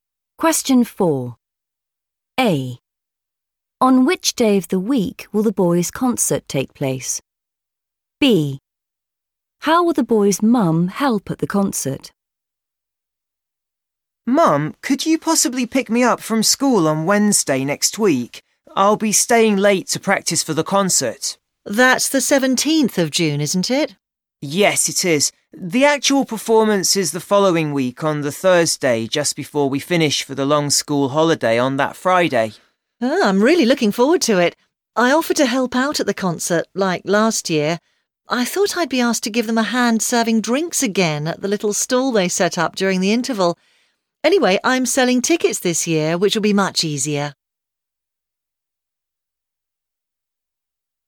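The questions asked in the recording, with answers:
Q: On which day of the week will the boys' concert take place?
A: Thursday

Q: How will the boys' mum help at the concert?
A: selling tickets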